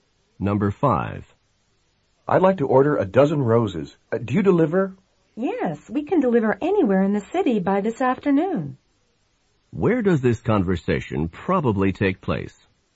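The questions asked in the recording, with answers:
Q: Where does this conversation probably take place?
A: At a florist's shop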